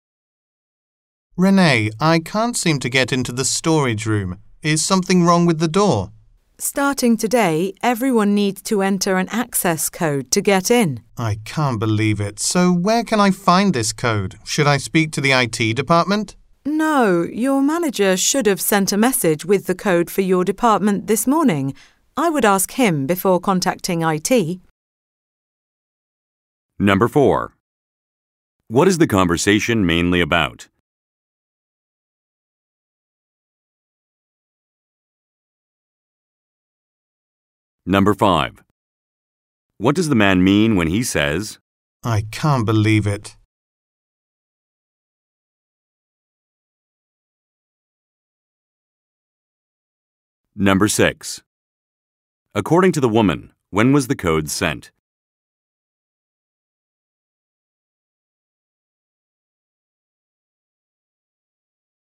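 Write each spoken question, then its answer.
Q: What is the conversation mainly about?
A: Getting into the storage room, which now needs an access code

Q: According to the woman, when was the code sent?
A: This morning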